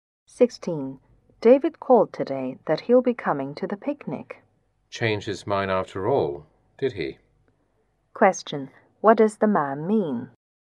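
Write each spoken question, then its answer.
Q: What does the man mean?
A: He is surprised that David changed his mind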